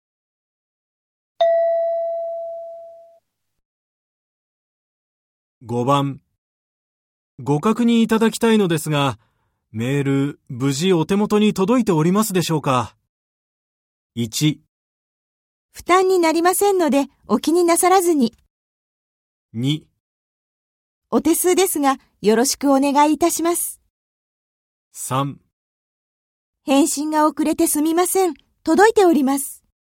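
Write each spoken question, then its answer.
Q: ご確認いただきたいのですが、メール、無事お手元に届いておりますでしょうか。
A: 3: 返信が遅れてすみません。届いております。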